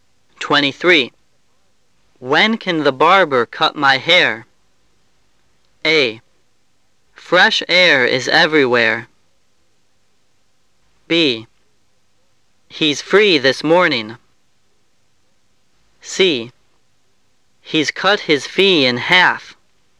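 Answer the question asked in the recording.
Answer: B: He's free this morning.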